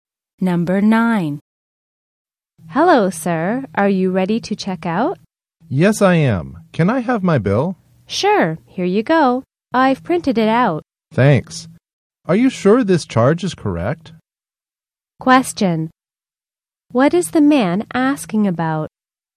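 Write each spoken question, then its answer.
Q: What is the man asking about?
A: Whether a charge on his bill is correct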